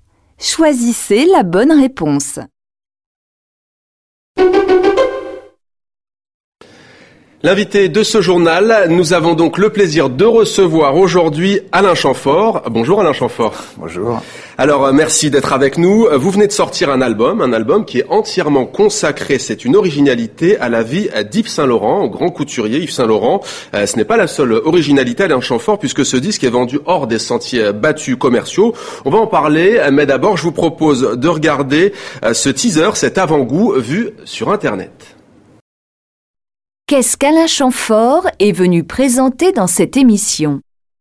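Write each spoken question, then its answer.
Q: Qu'est-ce qu'Alain Chamfort est venu présenter dans cette émission ?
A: Un album consacré à la vie d'Yves Saint-Laurent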